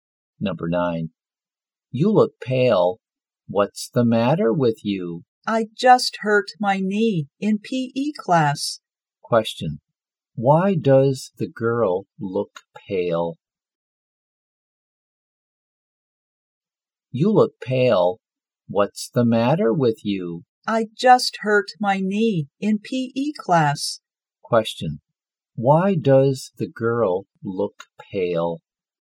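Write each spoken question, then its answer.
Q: Question, why does the girl look pale?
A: She hurt her knee in PE class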